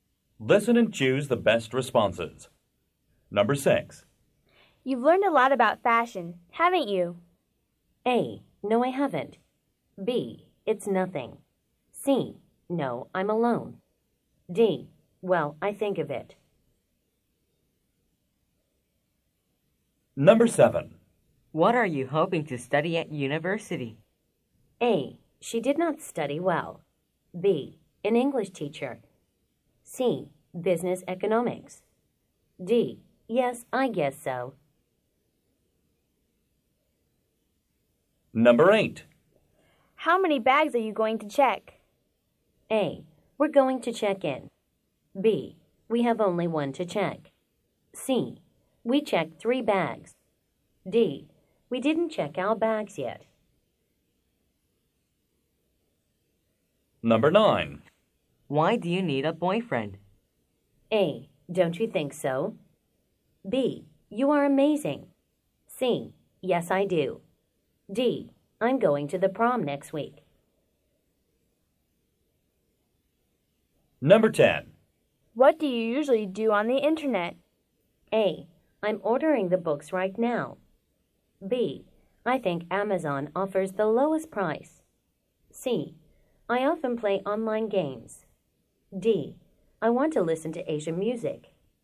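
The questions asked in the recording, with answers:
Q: What are you hoping to study at university?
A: C: Business economics.

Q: How many bags are you going to check?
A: B: We have only one to check.

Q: Why do you need a boyfriend?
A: D: I'm going to the prom next week.

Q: What do you usually do on the internet?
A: C: I often play online games.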